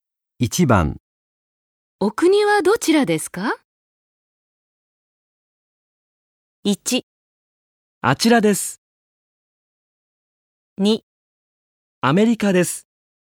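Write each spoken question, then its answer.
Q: お国はどちらですか?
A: 2: アメリカです。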